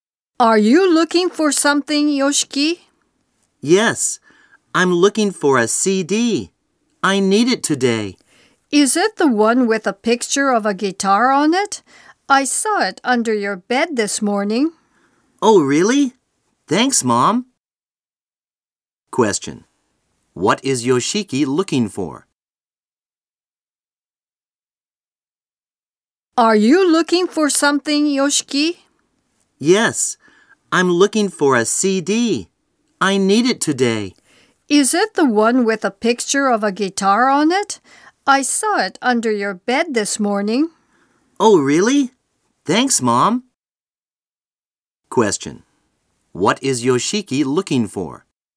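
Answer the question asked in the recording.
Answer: A CD with a picture of a guitar on it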